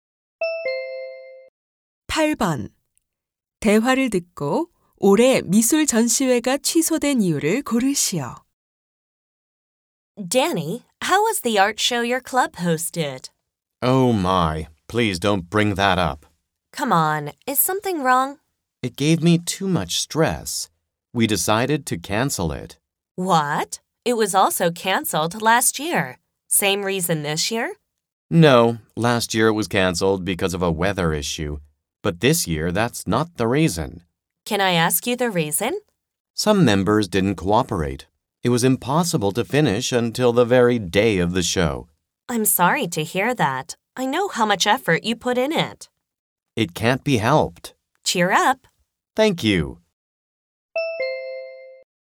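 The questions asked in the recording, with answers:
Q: 대화를 듣고 올해 미술 전시회가 취소된 이유를 고르시오.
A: 일부 회원들이 협조하지 않아서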